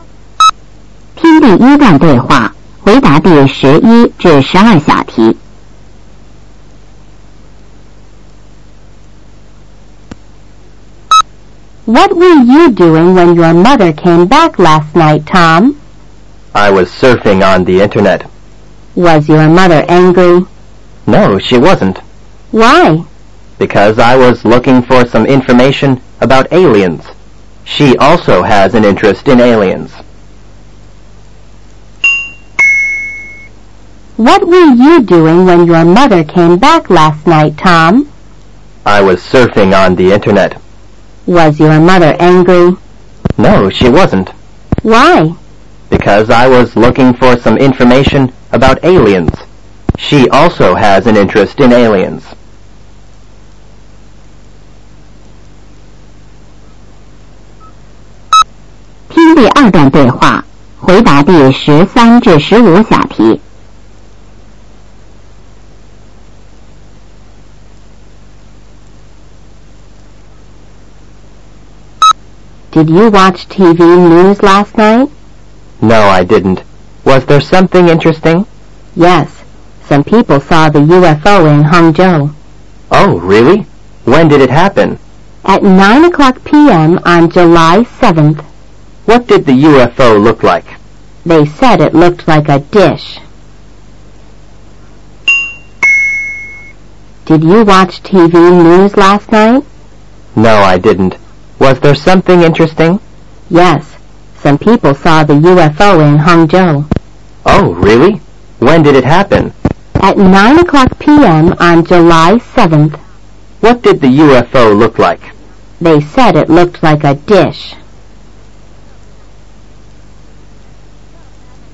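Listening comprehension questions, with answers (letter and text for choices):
三、听对话,选择正确答案。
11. What was Tom doing when his mother came back last night?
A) Watching TV.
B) Playing computer games.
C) Surfing on th e Internet.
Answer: C) Surfing on th e Internet.

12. Wh y wasn't To m's mother angry wi th him?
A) Tom always studies hard.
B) She also has an interested in aliens.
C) She was tired.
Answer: B) She also has an interested in aliens.

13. Where did some people see the U FO?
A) In Hangzhou.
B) In Suzhou.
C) In Guangzhou.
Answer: A) In Hangzhou.

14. When did they see it?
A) On June 7th.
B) On July 7th.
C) On July 17th.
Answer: B) On July 7th.

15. What did the UFO look like?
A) A plane.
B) A bird.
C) A dish.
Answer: C) A dish.

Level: 八年级下册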